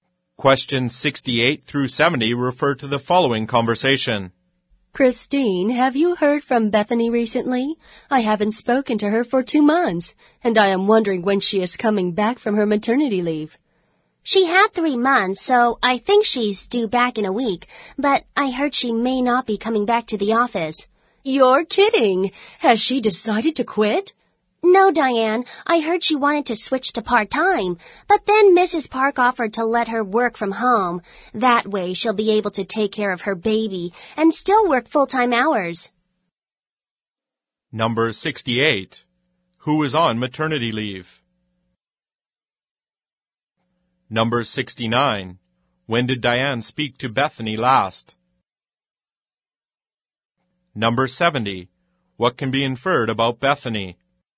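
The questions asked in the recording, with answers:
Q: Who is on maternity leave?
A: Bethany

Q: When did Diane speak to Bethany last?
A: 2 months ago

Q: What can be inferred about Bethany?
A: She will work full-time from home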